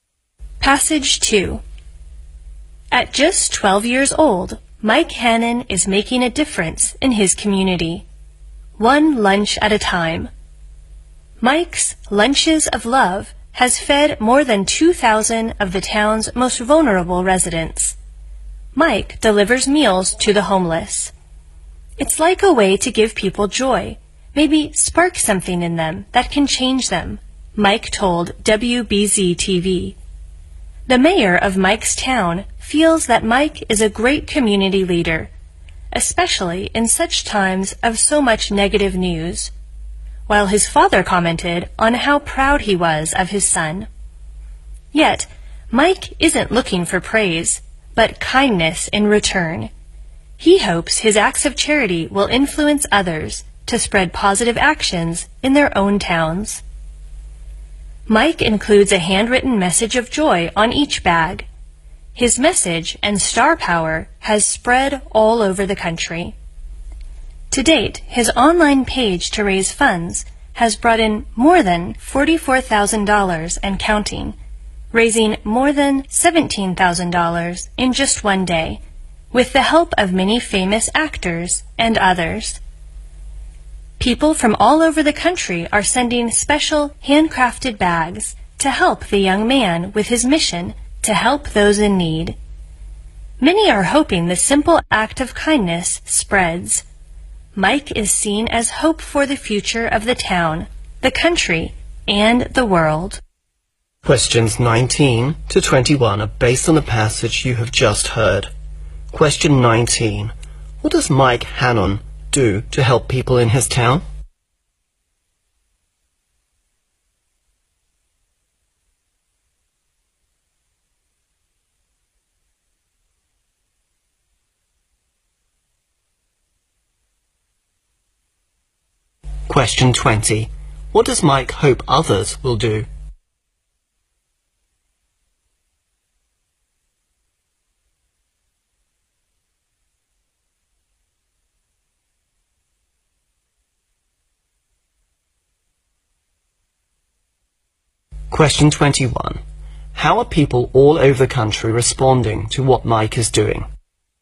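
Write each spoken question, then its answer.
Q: What does Mike Hannon do to help people in his town?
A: Delivers lunches to the homeless

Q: What does Mike hope others will do?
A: Spread positive actions in their own towns

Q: How are people all over the country responding to what Mike is doing?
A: Sending handcrafted bags and donating money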